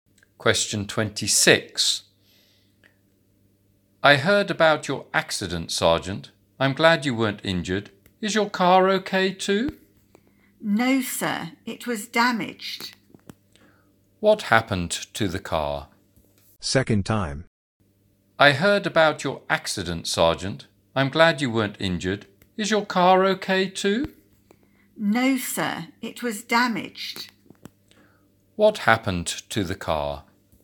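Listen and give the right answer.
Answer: It was damaged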